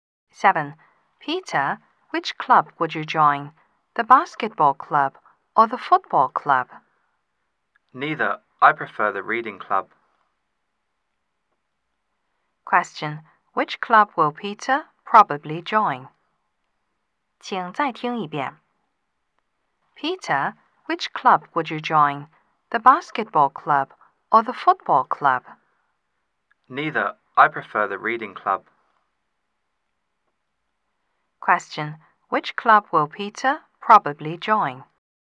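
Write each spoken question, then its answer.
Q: Which club will Peter probably join?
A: The reading club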